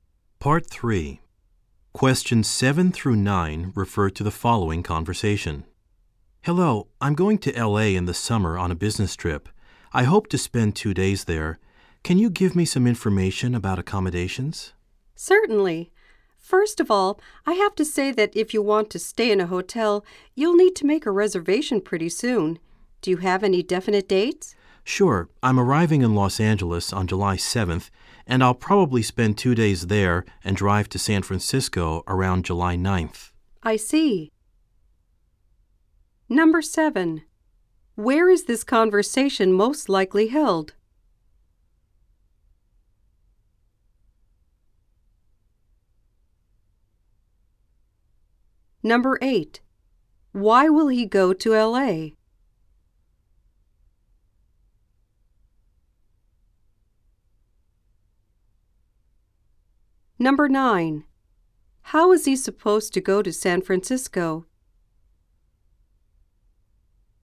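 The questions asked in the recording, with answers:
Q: Why will he go to LA?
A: On a business trip

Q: How is he supposed to go to San Francisco?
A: He will drive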